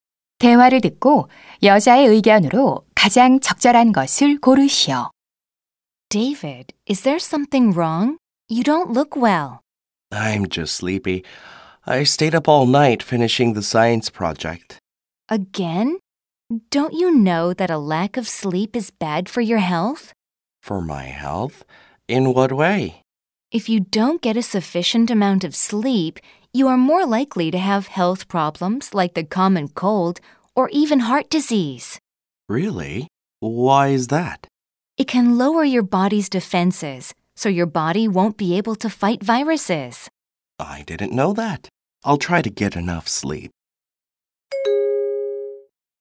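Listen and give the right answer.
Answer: 수면 부족은 건강에 해롭다.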